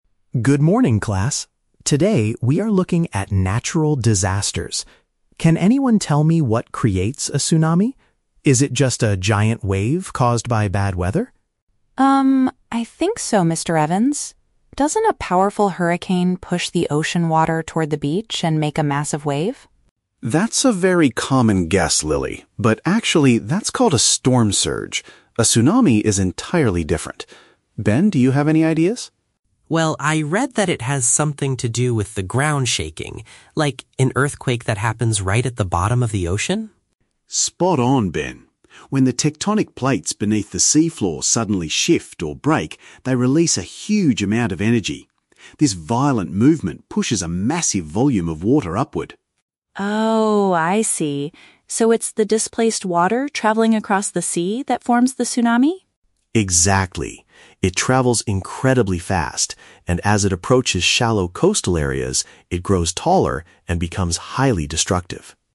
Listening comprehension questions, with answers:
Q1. What does Lily initially believe is the main cause of a tsunami?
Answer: A strong tropical storm.

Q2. According to the teacher, what actually triggers a tsunami?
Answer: A violent shaking of the earth under the sea.

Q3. What happens to the wave as it gets closer to the shore?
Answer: It increases in height and danger.

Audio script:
Mr. Evans: Good morning, class. Today we are looking at natural disasters. Can anyone tell me what creates a tsunami? Is it just a giant wave caused by bad weather?
Lily: Um, I think so, Mr. Evans. Doesn't a powerful hurricane push the ocean water toward the beach and make a massive wave?
Mr. Evans: That's a very common guess, Lily, but actually, that's called a storm surge. A tsunami is entirely different. Ben, do you have any ideas?
Ben: Well, I read that it has something to do with the ground shaking. Like... an earthquake that happens right at the bottom of the ocean?
Mr. Evans: Spot on, Ben. When the tectonic plates beneath the seafloor suddenly shift or break, they release a huge amount of energy. This violent movement pushes a massive volume of water upward.
Lily: Oh, I see. So it's the displaced water traveling across the sea that forms the tsunami?
Mr. Evans: Exactly. It travels incredibly fast, and as it approaches shallow coastal areas, it grows taller and becomes highly destructive.